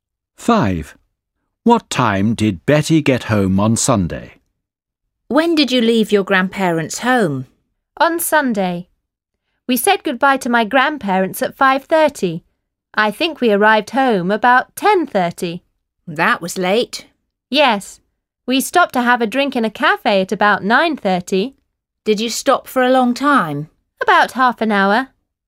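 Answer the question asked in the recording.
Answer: About 10:30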